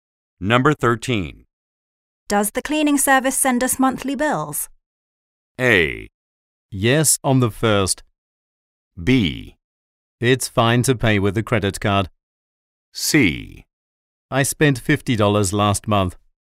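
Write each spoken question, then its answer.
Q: Does the cleaning service send us monthly bills?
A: A: Yes, on the 1st.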